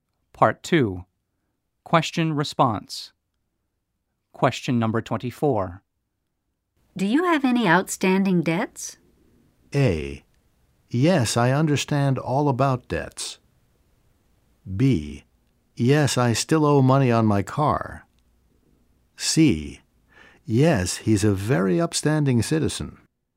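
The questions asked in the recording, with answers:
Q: Do you have any outstanding debts?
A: B: Yes, I still owe money on my car.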